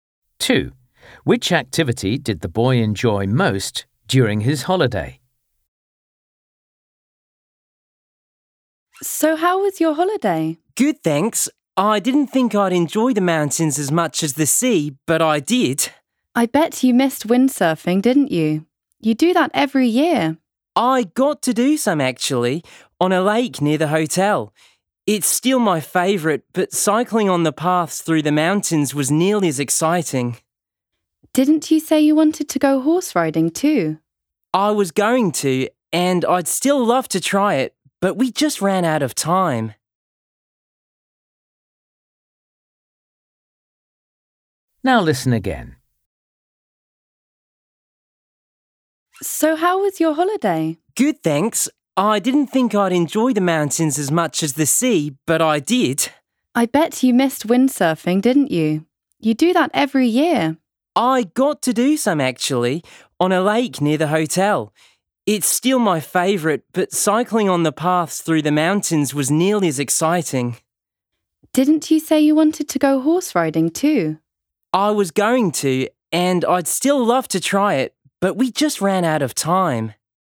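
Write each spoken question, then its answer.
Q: Which activity did the boy enjoy most during his holiday?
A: windsurfing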